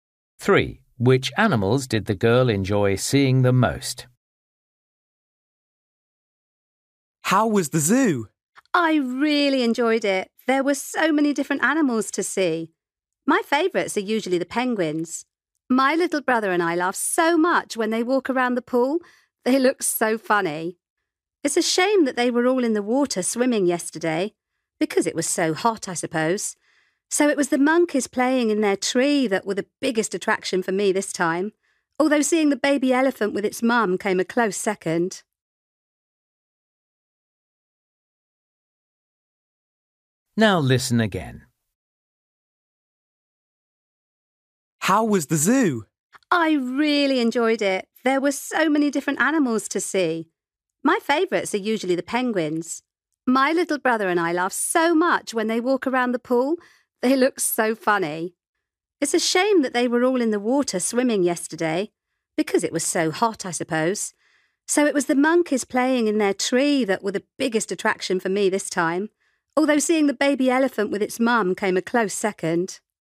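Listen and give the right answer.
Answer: The monkeys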